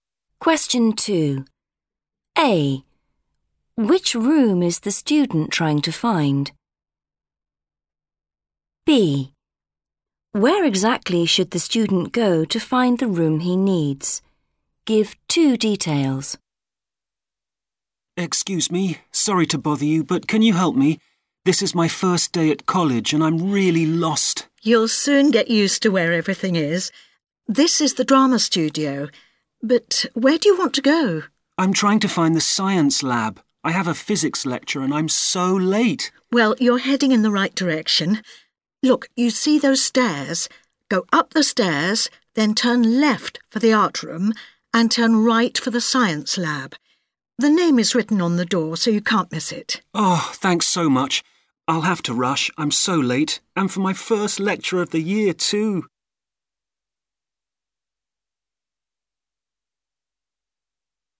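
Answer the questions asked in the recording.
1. the science lab
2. up the stairs, then turn right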